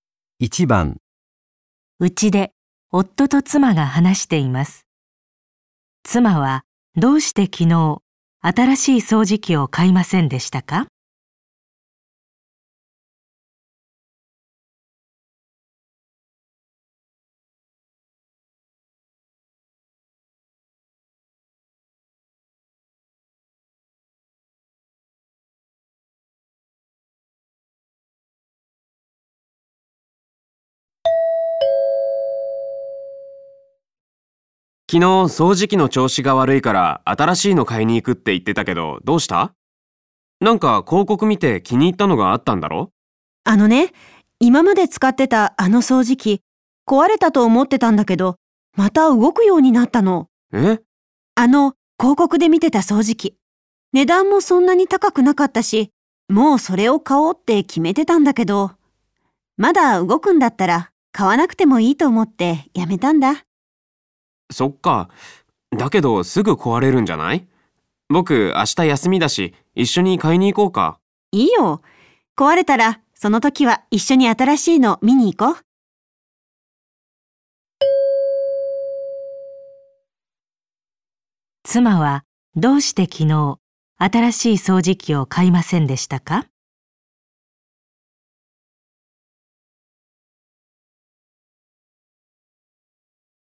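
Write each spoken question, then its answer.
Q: 妻はどうして昨日新しい掃除機を買いませんでしたか?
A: 今の掃除機がまた動くようになったから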